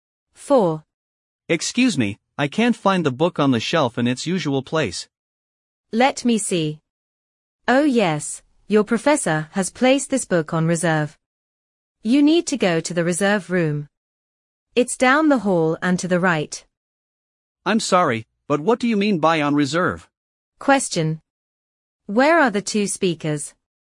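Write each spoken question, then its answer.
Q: Where are the two speakers?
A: In a library.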